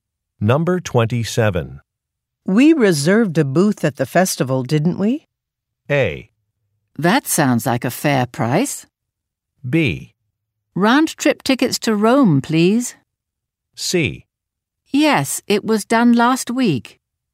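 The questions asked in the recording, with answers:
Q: We reserved a booth at the festival, didn't we?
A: C: Yes, it was done last week.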